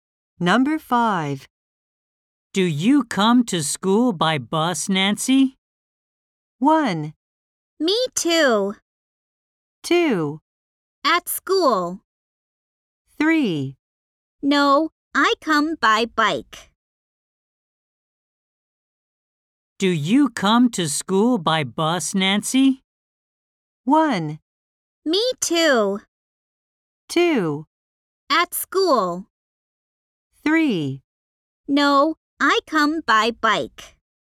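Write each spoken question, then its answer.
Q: Do you come to school by bus, Nancy?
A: 3: No, I come by bike.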